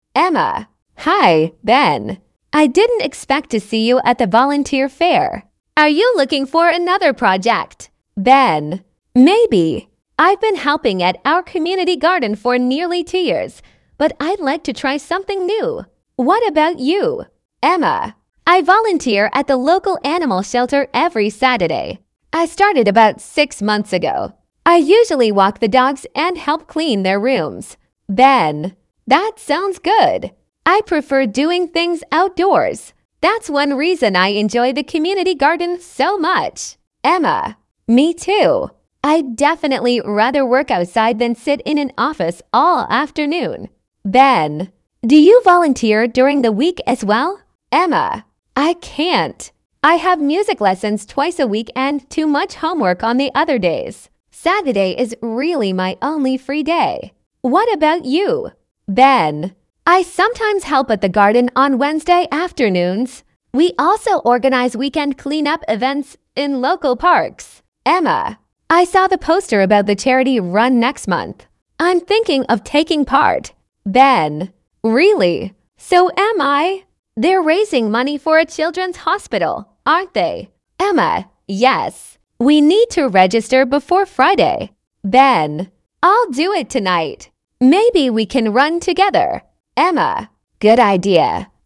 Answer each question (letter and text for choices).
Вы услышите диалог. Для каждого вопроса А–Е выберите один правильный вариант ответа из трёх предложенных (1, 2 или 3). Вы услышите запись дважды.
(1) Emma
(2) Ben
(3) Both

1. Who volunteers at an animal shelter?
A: (1) Emma

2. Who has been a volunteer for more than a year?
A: (2) Ben

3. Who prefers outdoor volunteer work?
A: (3) Both

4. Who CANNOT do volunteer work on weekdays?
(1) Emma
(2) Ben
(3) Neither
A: (1) Emma

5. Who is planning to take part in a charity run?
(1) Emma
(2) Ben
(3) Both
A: (3) Both

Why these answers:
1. Emma говорит, что каждую субботу работает волонтёром в приюте для животных.
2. Ben помогает в общественном саду почти два года, тогда как Emma начала волонтёрскую работу около шести месяцев назад.
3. Оба участника диалога говорят, что предпочитают работу на открытом воздухе.
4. Emma не может заниматься волонтёрством в будние дни из-за музыкальных занятий и домашней работы.
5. И Emma, и Ben собираются принять участие в благотворительном забеге.

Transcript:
Emma: Hi, Ben. I didn't expect to see you at the volunteer fair. Are you looking for another project?
Ben: Maybe. I've been helping at our community garden for nearly two years, but I'd like to try something new. What about you?
Emma: I volunteer at the local animal shelter every Saturday. I started about six months ago. I usually walk the dogs and help clean their rooms.
Ben: That sounds good. I prefer doing things outdoors. That's one reason I enjoy the community garden so much.
Emma: Me too. I'd definitely rather work outside than sit in an office all afternoon.
Ben: Do you volunteer during the week as well?
Emma: I can't. I have music lessons twice a week and too much homework on the other days. Saturday is really my only free day. What about you?
Ben: I sometimes help at the garden on Wednesday afternoons. We also organise weekend clean-up events in local parks.
Emma: I saw the poster about the charity run next month. I'm thinking of taking part.
Ben: Really? So am I! They're raising money for a children's hospital, aren't they?
Emma: Yes. We need to register before Friday.
Ben: I'll do it tonight. Maybe we can run together.
Emma: Good idea!

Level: 10 класса